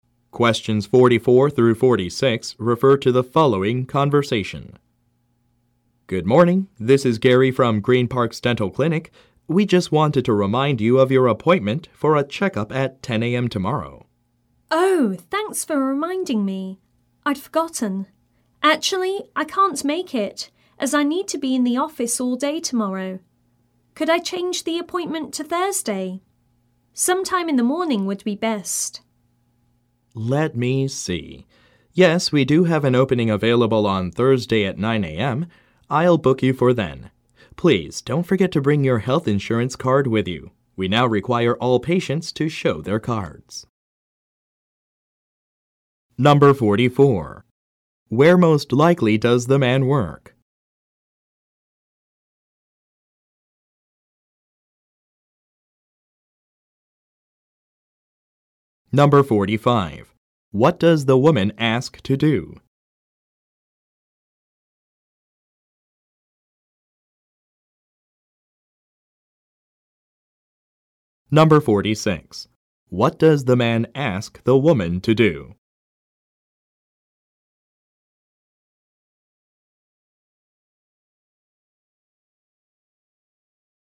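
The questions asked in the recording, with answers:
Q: Where most likely does the man work?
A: At a dental clinic

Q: What does the woman ask to do?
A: Change her appointment to Thursday

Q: What does the man ask the woman to do?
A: Bring her health insurance card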